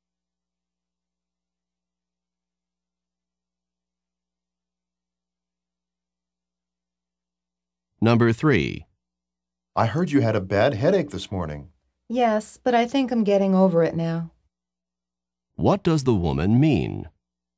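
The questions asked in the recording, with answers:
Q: What does the woman mean?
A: She is recovering from her headache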